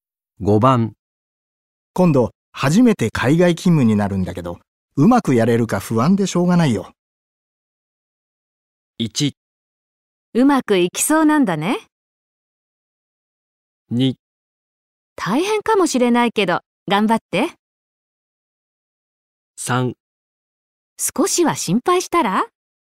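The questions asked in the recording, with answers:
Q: 今度初めて海外勤務になるんだけど、うまくやれるか不安でしょうがないよ。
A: 2: 大変かもしれないけど、頑張って。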